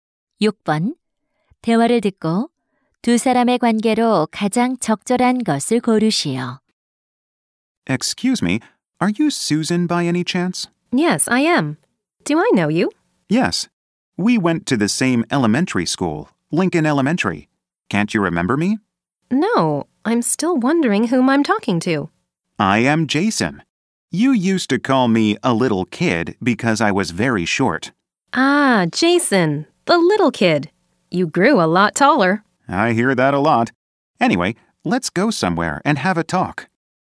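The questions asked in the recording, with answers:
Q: 대화를 듣고 두 사람의 관계로 가장 적절한 것을 고르시오.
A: 초등학교 동창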